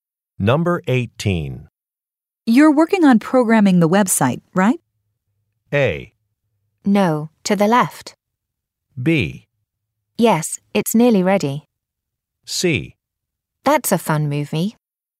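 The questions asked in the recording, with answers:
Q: You're working on programming the website, right?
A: B: Yes, it's nearly ready.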